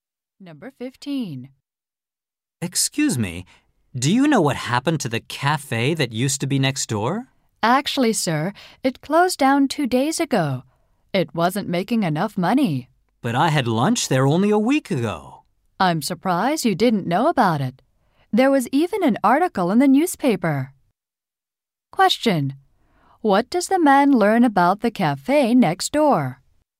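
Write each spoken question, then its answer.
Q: What does the man learn about the cafe next door?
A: It closed down two days ago.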